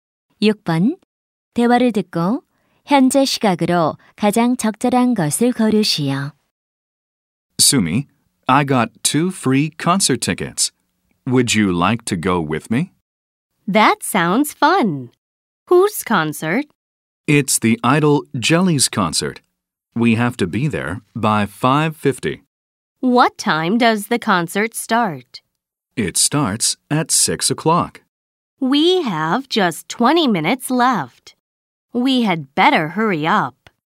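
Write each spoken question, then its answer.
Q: 대화를 듣고 현재 시각으로 가장 적절한 것을 고르시오.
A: 5시 30분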